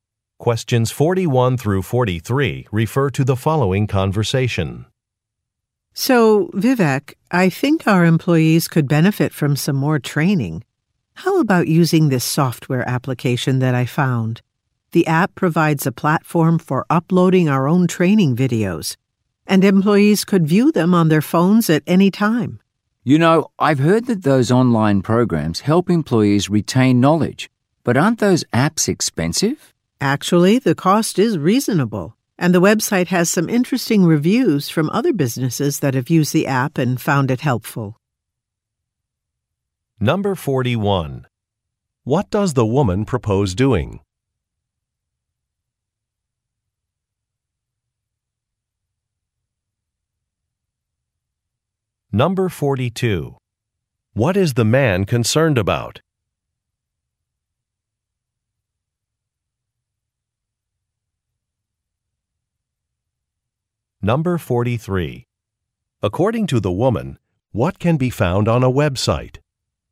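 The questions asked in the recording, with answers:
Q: What does the woman propose doing?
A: Using a training software app

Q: What is the man concerned about?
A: The cost

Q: According to the woman, what can be found on a website?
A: Reviews from other businesses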